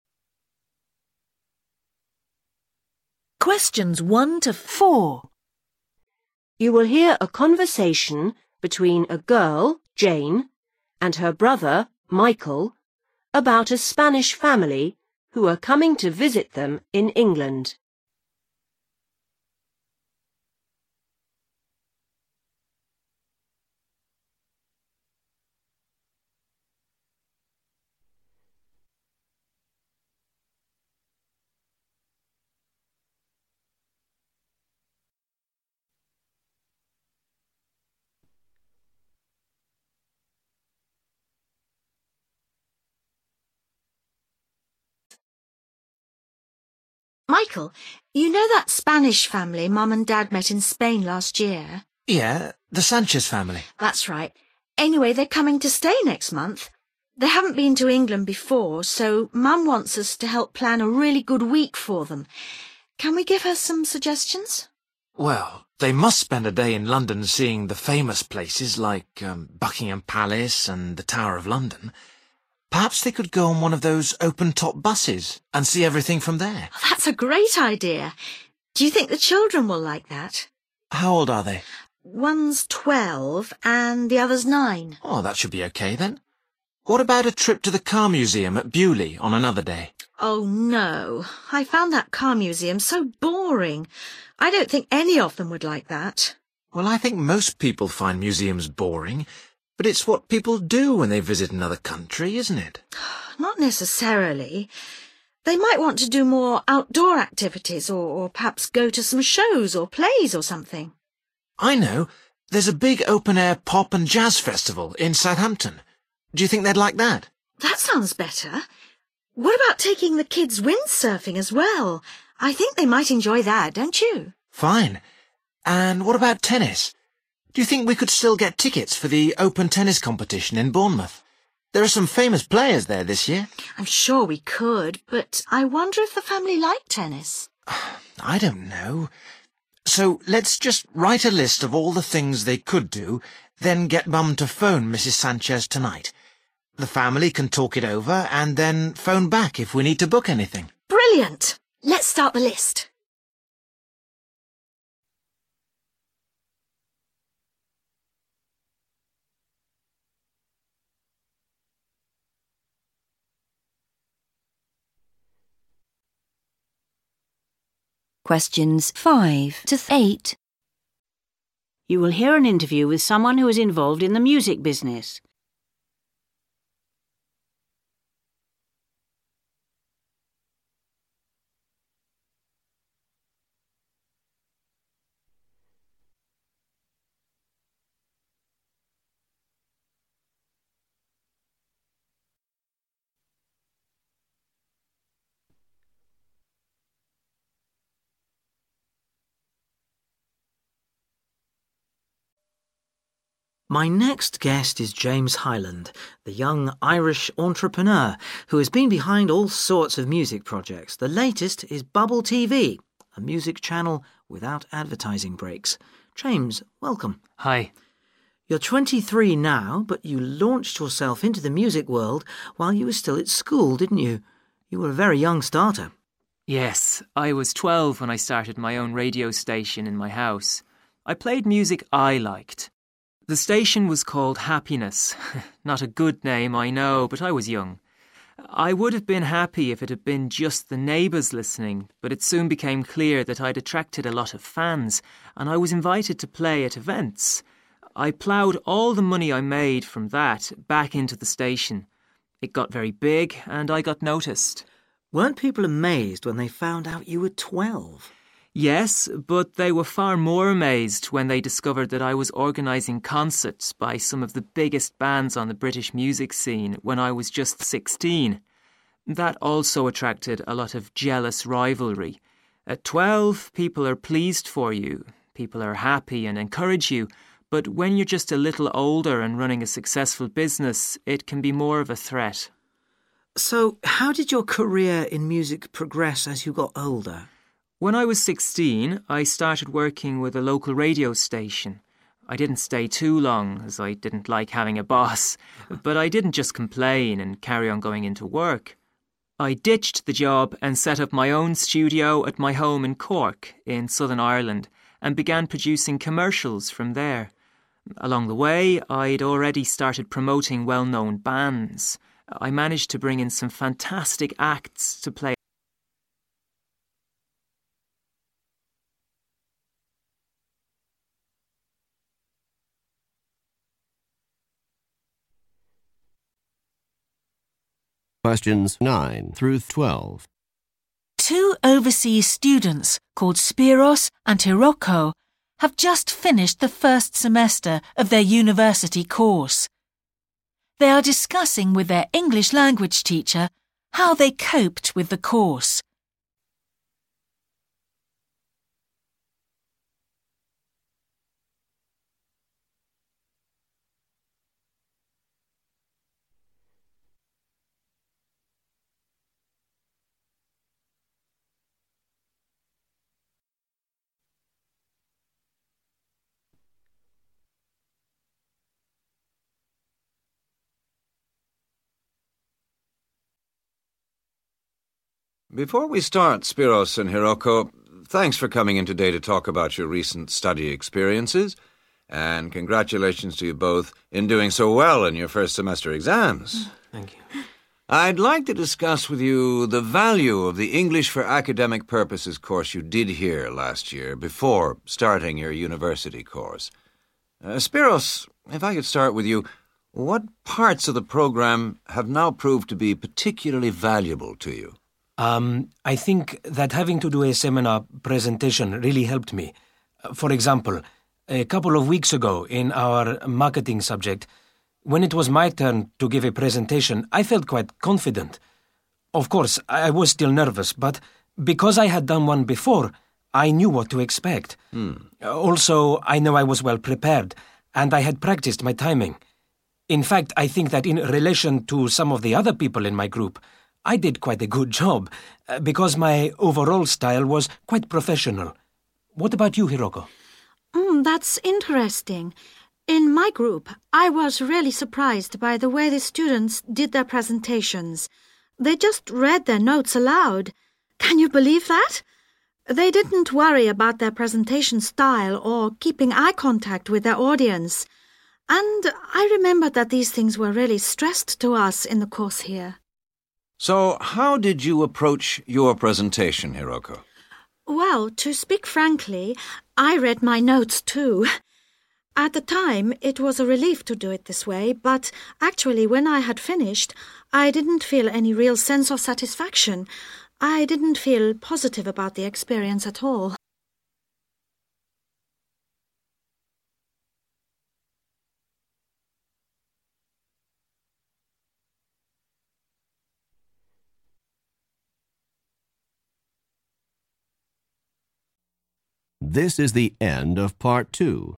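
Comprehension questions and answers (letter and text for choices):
What are Jane and Michael talking about?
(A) Their trip to Spain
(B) Their parents' trip to London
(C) Activities for the Sanchez family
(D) Activities for their family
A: (C) Activities for the Sanchez family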